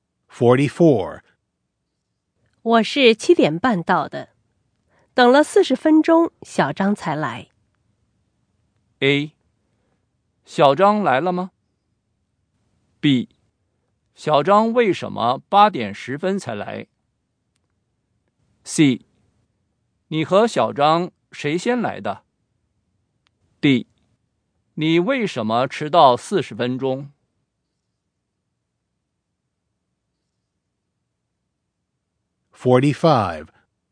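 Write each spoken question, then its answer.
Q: 我是7点半到的。 等了40分钟,小张才来。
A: B: 小张为什么8点10分才来?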